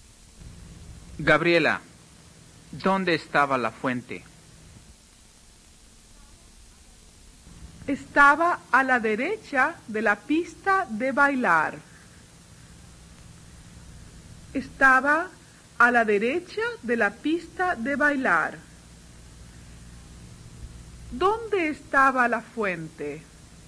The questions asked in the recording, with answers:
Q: ¿Dónde estaba la fuente?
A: Estaba a la derecha de la pista de bailar.